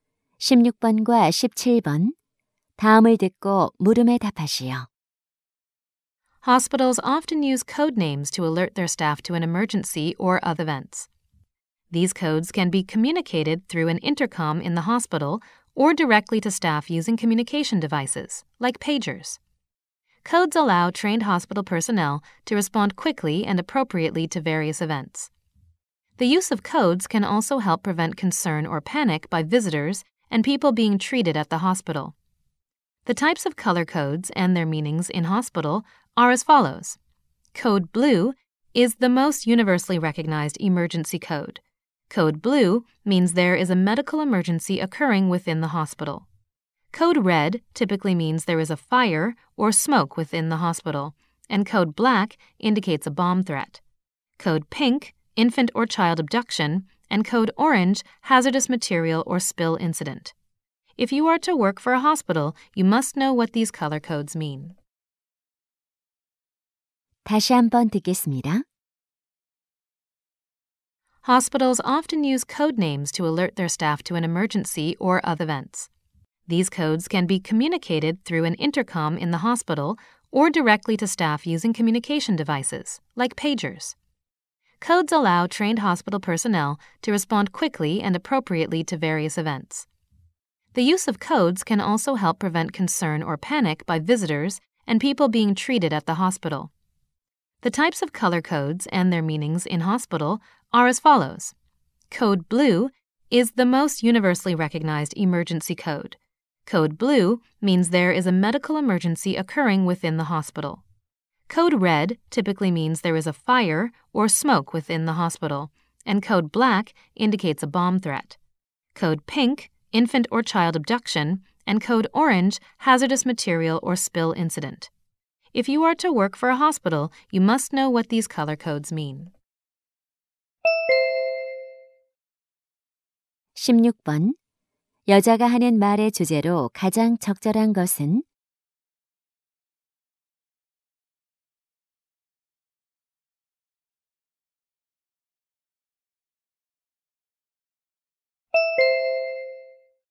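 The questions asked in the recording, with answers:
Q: 여자가 하는 말의 주제로 가장 적절한 것은?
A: 병원에서 사용하는 색깔 코드의 의미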